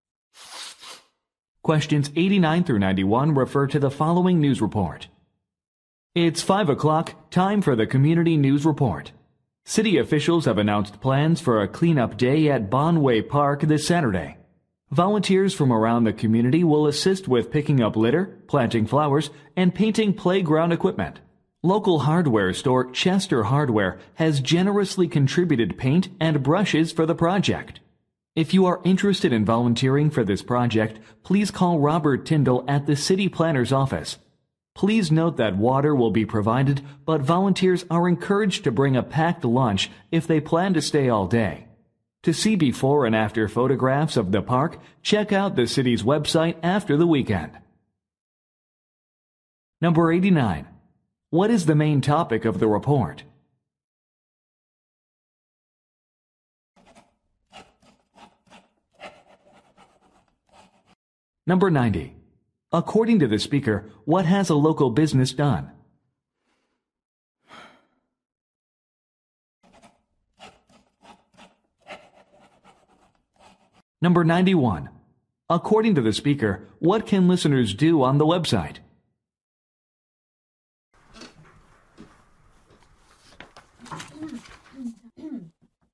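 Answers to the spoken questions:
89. A cleanup day at Bonway Park
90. Donated paint and brushes
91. See before and after photos of the park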